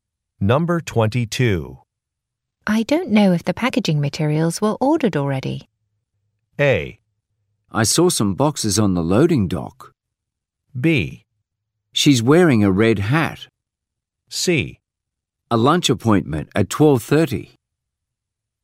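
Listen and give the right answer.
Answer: A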